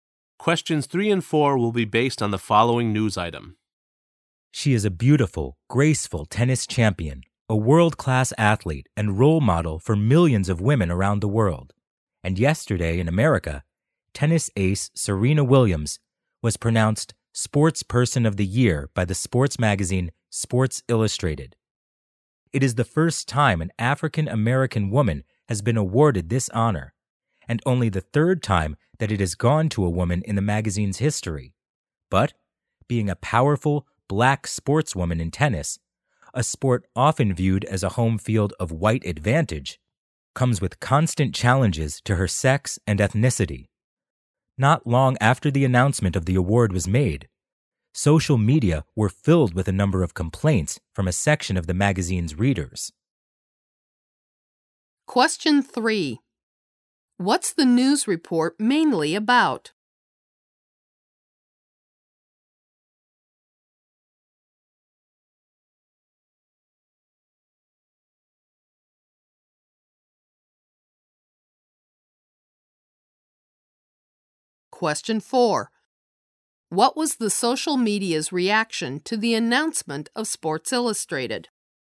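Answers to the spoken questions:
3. Serena Williams was named Sports Person of the Year by Sports Illustrated.
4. Some of the magazine's readers posted complaints.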